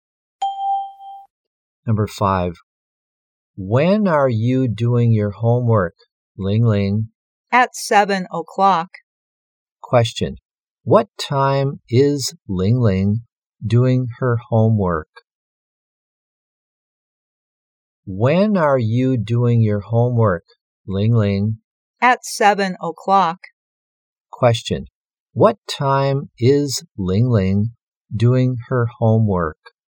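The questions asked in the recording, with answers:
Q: what time is Ling Ling doing her homework?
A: At 7 o'clock.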